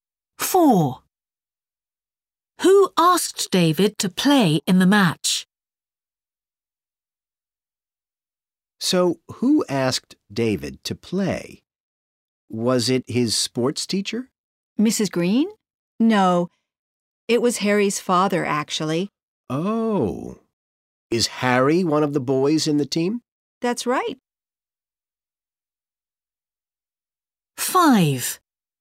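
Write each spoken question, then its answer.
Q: Who asked David to play in the match?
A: Harry's father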